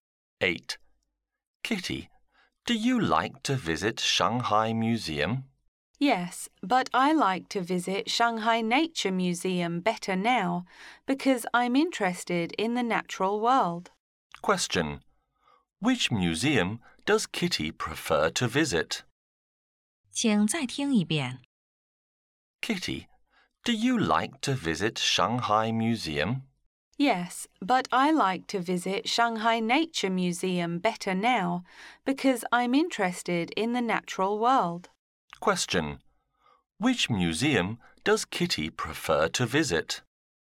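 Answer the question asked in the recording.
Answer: Shanghai Nature Museum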